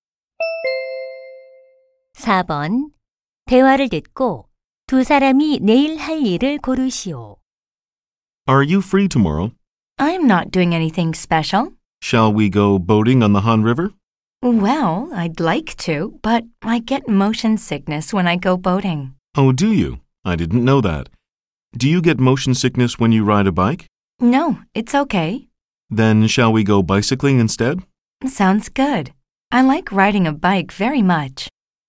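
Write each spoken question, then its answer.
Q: 대화를 듣고 두 사람이 내일 할 일을 고르시오.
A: 자전거 타기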